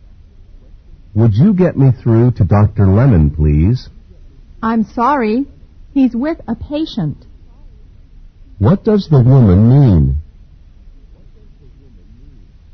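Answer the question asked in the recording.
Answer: Dr. Lemon is busy with a patient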